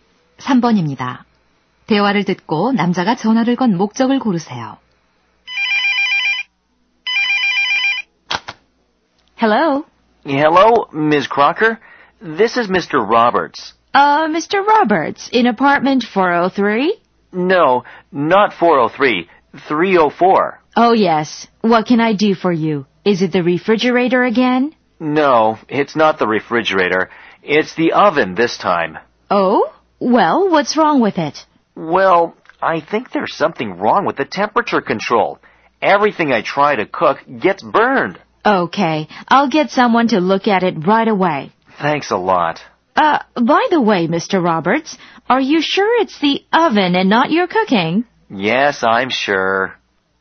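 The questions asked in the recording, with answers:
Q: 대화를 듣고 남자가 전화를 건 목적을 고르세요.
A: 오븐 고장을 알리고 수리를 요청하려고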